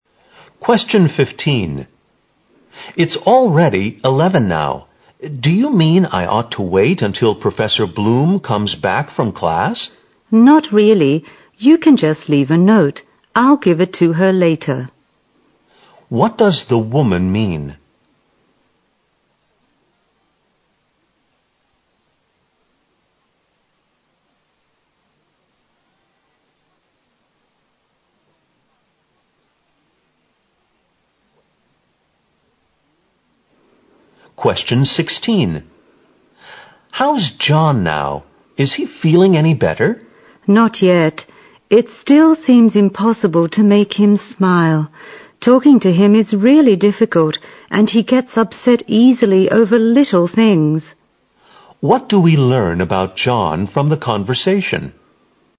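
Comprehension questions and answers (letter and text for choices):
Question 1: What does the woman mean?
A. She isn't sure when Professor Bloom will be back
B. The man shouldn't be late for his class.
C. The man can come back sometime later.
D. She can pass on the message for the man.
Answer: D. She can pass on the message for the man.

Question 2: What do we learn about John from the conversation?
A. He has a strange personality.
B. He's got emotional problems.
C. His illness is beyond cure.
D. His behavior is hard to explain.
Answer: B. He's got emotional problems.

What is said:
Do you mean I ought to wait until Prof. Bloom comes back from class?
W: Not really. You can just leave a note. I'll give it to her later.
Q: What does the woman mean?
M: How's John now? Is he feeling any better?
W: Not yet. It still seems impossible to make him smile. Talking to him is really difficult. And he gets upset easily over little things.
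Q: What do we learn about John from the conversation?

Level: 四级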